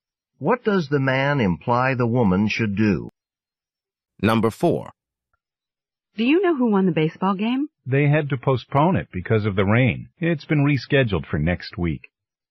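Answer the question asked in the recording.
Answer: The game was postponed because of rain and will be played next week.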